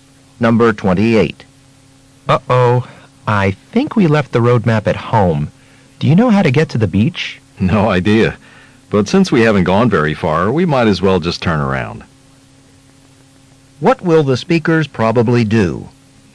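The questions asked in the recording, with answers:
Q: What will the speakers probably do?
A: Go back home for the map.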